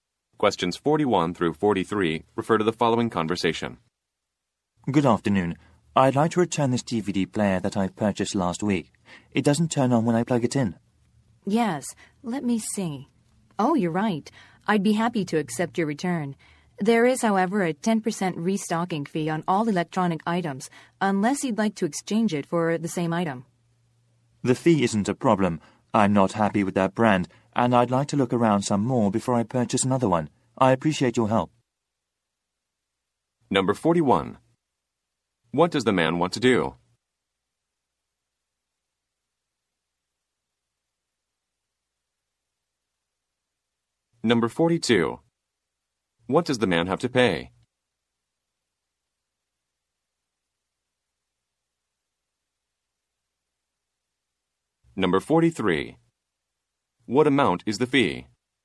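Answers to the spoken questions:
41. Return a DVD player
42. A restocking fee
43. 10%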